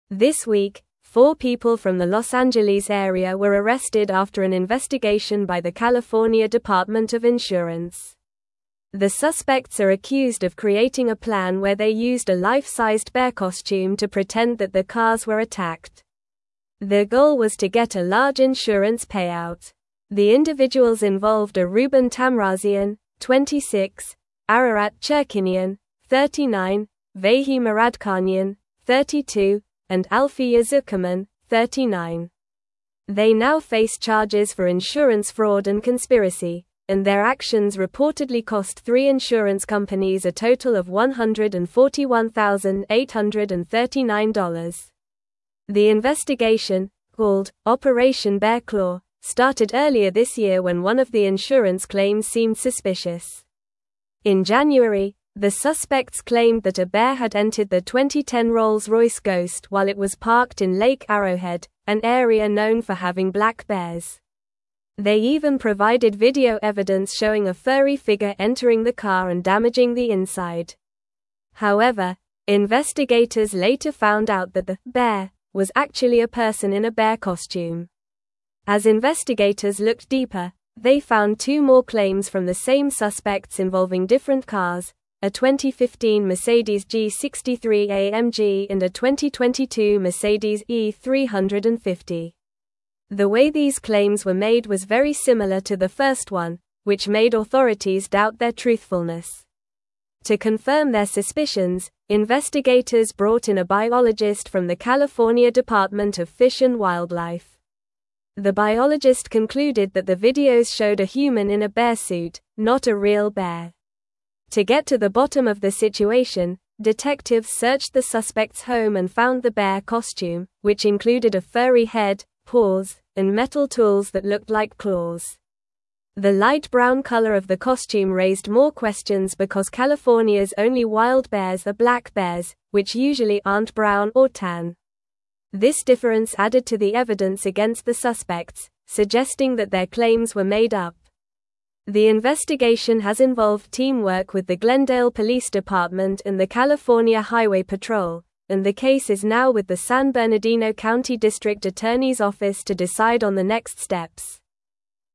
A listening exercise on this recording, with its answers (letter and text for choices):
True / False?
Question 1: A biologist confirmed that the videos showed a human in a bear suit, not a real bear.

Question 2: The suspects claimed a bear damaged their 2010 Rolls Royce Ghost while it was parked.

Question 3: The investigation was called "Operation Bear Paw."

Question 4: The suspects used a bear costume to fake car attacks and claim insurance money.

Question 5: Investigators discovered that the bear in the video was actually a real bear.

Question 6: The suspects also made similar false claims about a 2015 Mercedes and a 2022 Mercedes.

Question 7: Four people from Los Angeles were released for insurance fraud this week.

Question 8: The total amount gained by the insurance companies due to the suspects' actions was $141,839.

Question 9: What was the main accusation against the four suspects from Los Angeles?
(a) Theft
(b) Insurance fraud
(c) Vandalism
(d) Identity theft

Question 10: What did the suspects use to pretend that their cars were attacked?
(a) A life-sized bear costume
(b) A fake bear statue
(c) A stuffed animal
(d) A cardboard cutout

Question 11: How much money did the suspects reportedly cost the insurance companies?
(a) $141,839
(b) $50,000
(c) $200,000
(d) $75,000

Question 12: What was the name of the investigation into the suspects' activities?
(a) Operation Furry Fraud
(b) Operation Costume Crime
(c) Operation Bear Claw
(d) Operation Animal Attack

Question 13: Which car did the suspects claim was attacked by a bear in January?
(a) 2015 Mercedes G63 AMG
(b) 2022 Mercedes E350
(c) 2010 Rolls Royce Ghost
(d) 2018 BMW X5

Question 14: What did the biologist conclude about the videos provided by the suspects?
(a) They showed a real bear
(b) They showed a human in a bear suit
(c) They were edited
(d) They were taken in a different location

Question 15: What did detectives find in the suspects' home that raised suspicions?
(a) Fake insurance documents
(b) A video camera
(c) A real bear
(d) A bear costume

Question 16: Which department collaborated with the California Department of Insurance in this investigation?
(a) Los Angeles Fire Department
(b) California Highway Patrol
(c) San Bernardino County Sheriff's Office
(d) Glendale Police Department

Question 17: Their goal was to get a large (1)______ payout.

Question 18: The individuals involved are Ruben Tamrazian, 26; (2)______ Chirkinian, 39;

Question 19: Vahe (3)______, 32; and Alfiya Zuckerman, 39.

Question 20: They now face charges for insurance fraud and (4)______, and their actions reportedly cost three insurance companies a total of $141,839.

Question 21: The investigation, called "Operation Bear Claw," started earlier this year when one of the insurance (5)______ seemed suspicious.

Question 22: In January, the suspects claimed that a bear had entered their 2010 Rolls (6)______ Ghost while it was parked in Lake Arrowhead, an area known for (7)______ black bears.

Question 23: In January, the suspects claimed that a bear had entered their 2010 Rolls (6)______ Ghost while it was parked in Lake Arrowhead, an area known for (7)______ black bears.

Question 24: They even provided video evidence showing a furry (8)______ entering the car and damaging the inside.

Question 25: As investigators looked deeper, they (9)______ two more claims from the same suspects involving (10)______ cars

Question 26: As investigators looked deeper, they (9)______ two more claims from the same suspects involving (10)______ cars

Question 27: To confirm their suspicions, investigators brought in a biologist from the California (11)______ of Fish and Wildlife.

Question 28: To get to the (12)______ of the situation, detectives searched the suspects' home and found the bear costume, which included a furry head, paws, and metal tools that (13)______ like (14)______.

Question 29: To get to the (12)______ of the situation, detectives searched the suspects' home and found the bear costume, which included a furry head, paws, and metal tools that (13)______ like (14)______.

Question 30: To get to the (12)______ of the situation, detectives searched the suspects' home and found the bear costume, which included a furry head, paws, and metal tools that (13)______ like (14)______.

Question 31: The light brown color of the costume raised more questions because (15)______'s only wild bears are black bears, which usually aren't brown or tan.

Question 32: The investigation has involved (16)______ with the Glendale Police Department and the California Highway Patrol,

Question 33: What was the main reason the four suspects were arrested by the California Department of Insurance?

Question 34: How did the suspects attempt to make their insurance claims seem believable?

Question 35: What was the name of the investigation that uncovered the suspects' scheme?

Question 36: What evidence did the suspects provide to support their claim about the bear attack on their car?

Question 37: What unusual items did detectives find in the suspects' home that raised suspicion about their claims?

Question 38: Why did the color of the bear costume raise questions during the investigation?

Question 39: Which organizations collaborated with the California Department of Insurance during the investigation?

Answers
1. True
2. True
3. False
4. True
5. False
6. True
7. False
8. False
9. (b) Insurance fraud
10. (a) A life-sized bear costume
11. (a) $141,839
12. (c) Operation Bear Claw
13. (c) 2010 Rolls Royce Ghost
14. (b) They showed a human in a bear suit
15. (d) A bear costume
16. (d) Glendale Police Department
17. insurance
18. Ararat
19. Muradkhanyan
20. conspiracy
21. claims
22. Royce
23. having
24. figure
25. found
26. different
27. Department
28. bottom
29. looked
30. claws
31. California
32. teamwork
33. The suspects were arrested for creating a plan to commit insurance fraud by pretending that their cars were attacked by a bear.
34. They claimed that a bear entered their car and provided video evidence showing a furry figure entering and damaging the inside of the vehicle.
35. The investigation was called "Operation Bear Claw."
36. They provided video footage that showed what they claimed was a bear entering their car and causing damage.
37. Detectives found a bear costume that included a furry head, paws, and metal tools that looked like claws.
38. The bear costume was light brown, while California's wild bears are black, which made it suspicious and suggested that the claims were made up.
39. The Glendale Police Department and the California Highway Patrol collaborated with the California Department of Insurance during the investigation.

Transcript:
This week, four people from the Los Angeles area were arrested after an investigation by the California Department of Insurance. The suspects are accused of creating a plan where they used a life-sized bear costume to pretend that their cars were attacked. Their goal was to get a large insurance payout. The individuals involved are Ruben Tamrazian, 26; Ararat Chirkinian, 39; Vahe Muradkhanyan, 32; and Alfiya Zuckerman, 39. They now face charges for insurance fraud and conspiracy, and their actions reportedly cost three insurance companies a total of $141,839.
The investigation, called "Operation Bear Claw," started earlier this year when one of the insurance claims seemed suspicious. In January, the suspects claimed that a bear had entered their 2010 Rolls Royce Ghost while it was parked in Lake Arrowhead, an area known for having black bears. They even provided video evidence showing a furry figure entering the car and damaging the inside. However, investigators later found out that the "bear" was actually a person in a bear costume.
As investigators looked deeper, they found two more claims from the same suspects involving different cars—a 2015 Mercedes G63 AMG and a 2022 Mercedes E350. The way these claims were made was very similar to the first one, which made authorities doubt their truthfulness. To confirm their suspicions, investigators brought in a biologist from the California Department of Fish and Wildlife. The biologist concluded that the videos showed a human in a bear suit, not a real bear.
To get to the bottom of the situation, detectives searched the suspects' home and found the bear costume, which included a furry head, paws, and metal tools that looked like claws. The light brown color of the costume raised more questions because California's only wild bears are black bears, which usually aren't brown or tan. This difference added to the evidence against the suspects, suggesting that their claims were made up. The investigation has involved teamwork with the Glendale Police Department and the California Highway Patrol, and the case is now with the San Bernardino County District Attorney's Office to decide on the next steps.
Original news source: They told insurers a bear damaged their car.

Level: Level 3